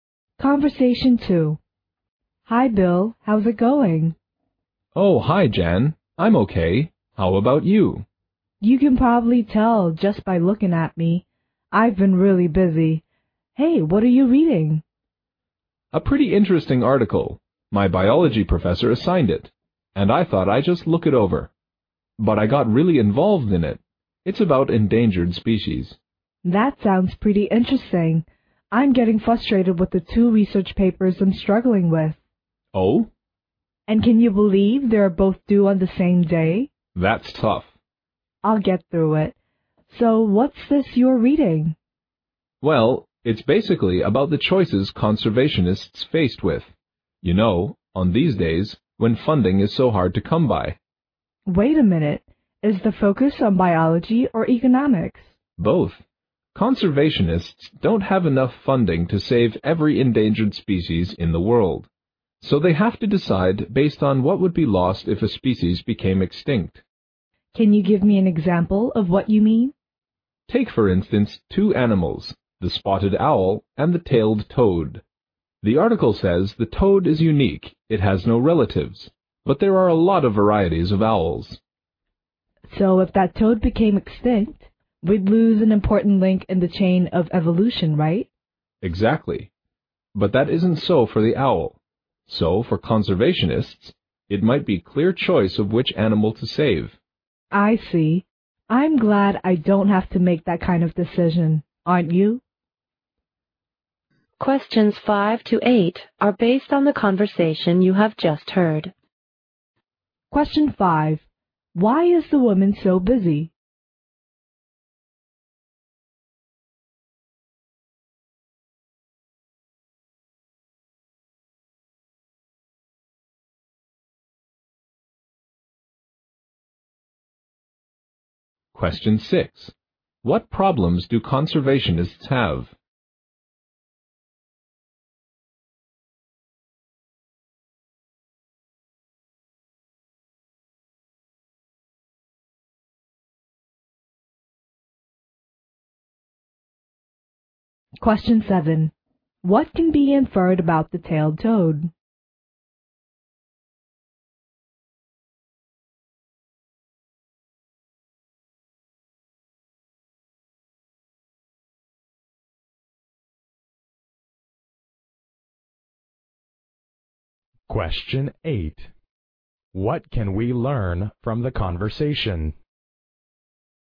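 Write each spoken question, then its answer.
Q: Why is the woman so busy?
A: She is struggling with two research papers that are due on the same day.

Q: What problems do conservationists have?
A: They don't have enough funding to save every endangered species.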